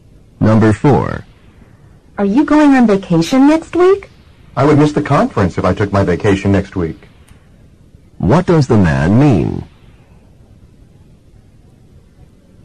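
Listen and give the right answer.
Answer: He isn't taking his vacation next week, because of the conference.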